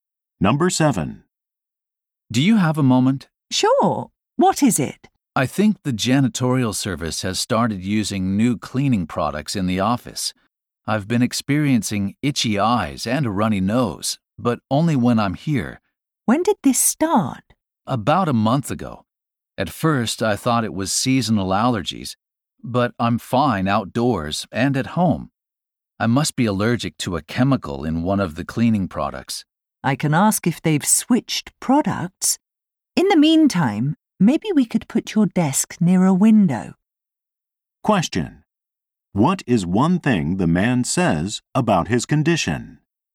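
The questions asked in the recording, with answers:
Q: What is one thing the man says about his condition?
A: He only has the symptoms at the office.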